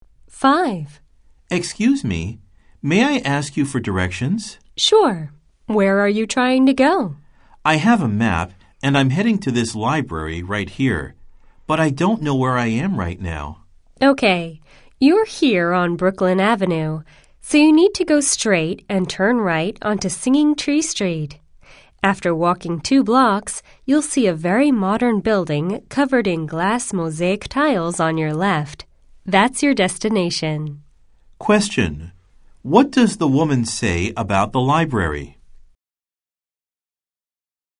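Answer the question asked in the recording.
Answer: It is a very modern building covered in glass mosaic tiles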